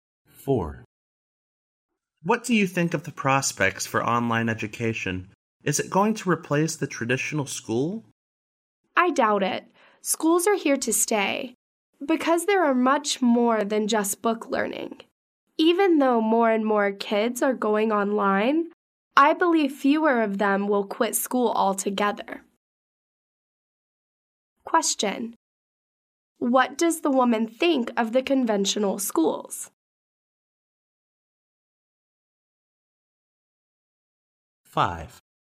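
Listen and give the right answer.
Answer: They will not be replaced; they offer more than book learning.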